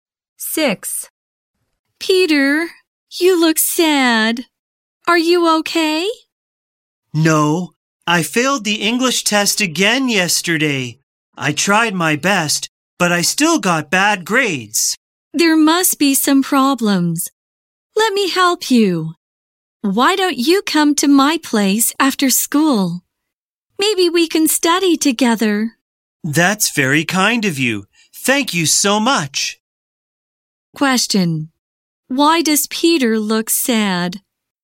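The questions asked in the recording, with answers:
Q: Why does Peter look sad?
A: He failed the English test again.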